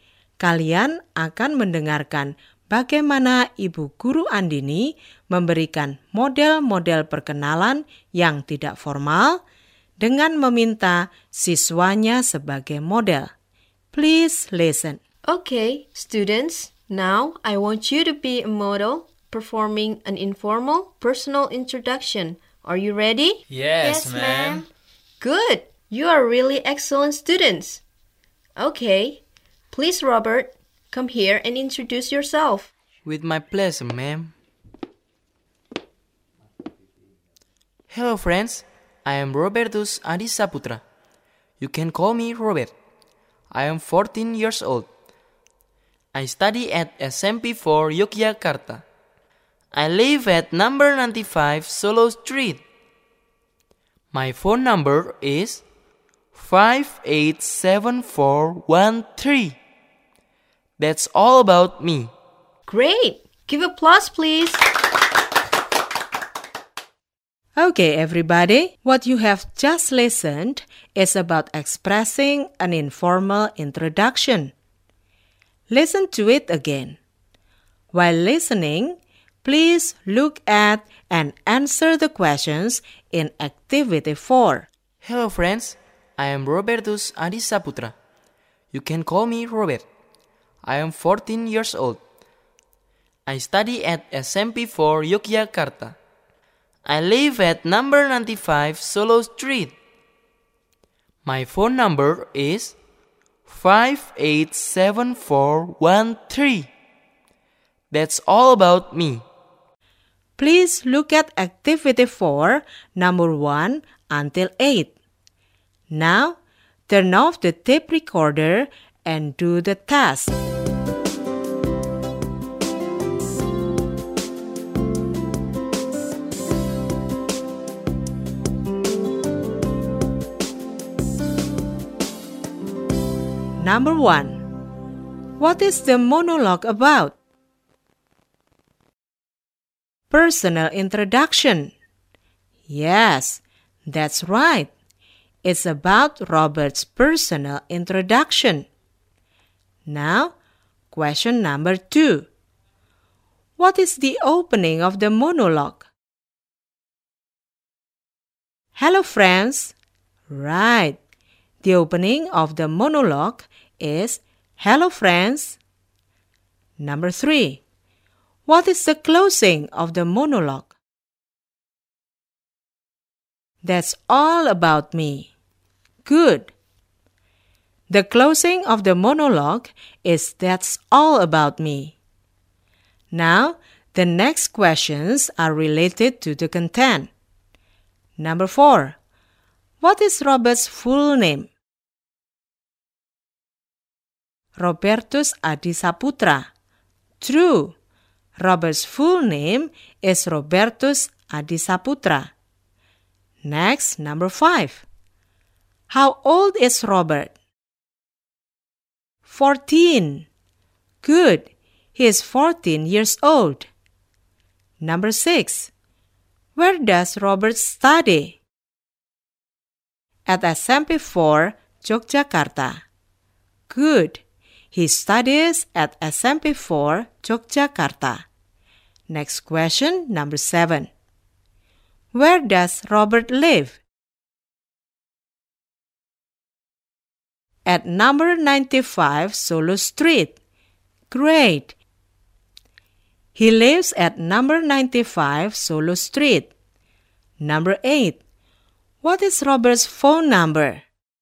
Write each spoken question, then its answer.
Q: What is the monologue about?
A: It's about Robert's personal introduction.

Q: What is the opening of the monologue?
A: The opening of the monologue is hello, friends.

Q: What is the closing of the monologue?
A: The closing of the monologue is that's all about me.

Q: What is Robert's full name?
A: Robert's full name is Robertus Adisa Putra.

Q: How old is Robert?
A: He is 14 years old.

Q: Where does Robert study?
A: He studies at SMP 4, Yogyakarta.

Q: What is Robert's phone number?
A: His phone number is 587413.